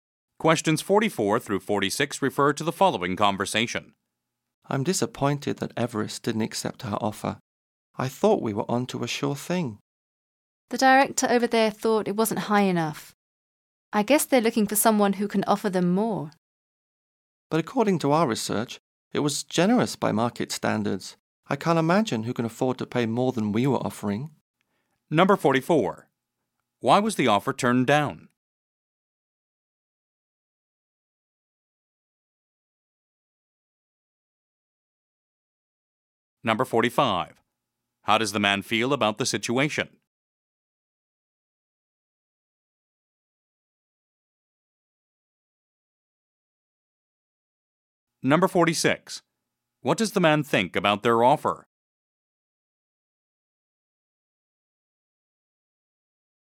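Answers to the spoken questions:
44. It wasn't high enough
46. It was generous by market standards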